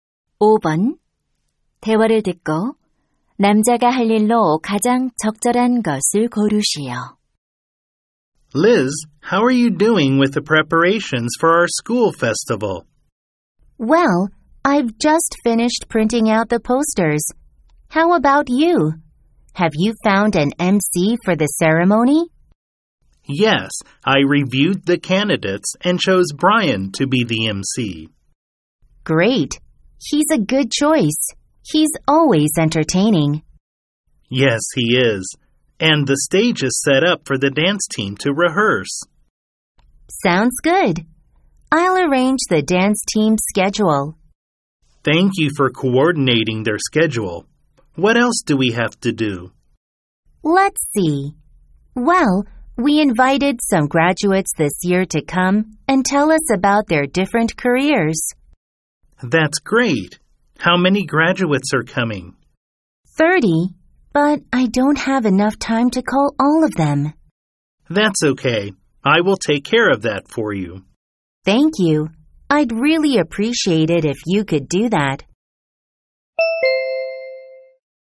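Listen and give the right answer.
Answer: 졸업생들에게 전화하기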